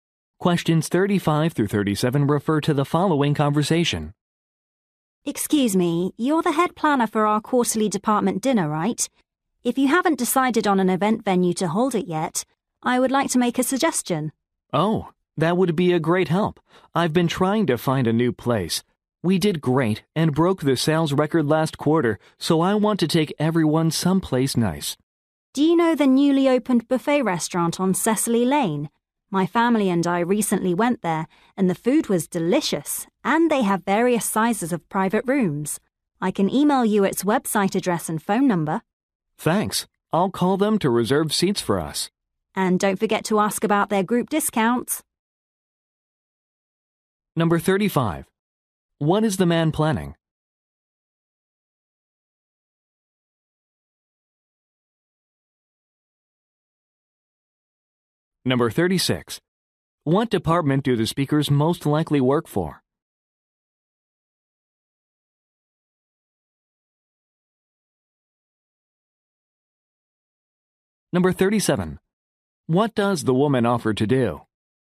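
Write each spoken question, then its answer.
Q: What is the man planning?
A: A quarterly department dinner

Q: What department do the speakers most likely work for?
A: Sales

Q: What does the woman offer to do?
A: Email the restaurant's website address and phone number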